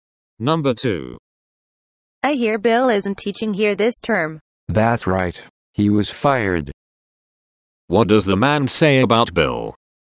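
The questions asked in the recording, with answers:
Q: What does the man say about Bill?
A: He was fired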